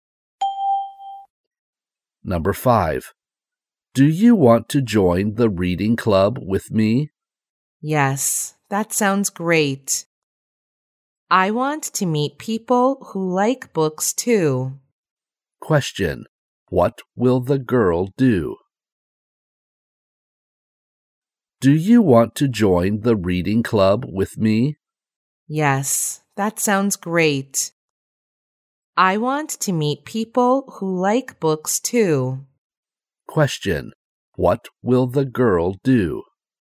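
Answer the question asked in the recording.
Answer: Join the reading club.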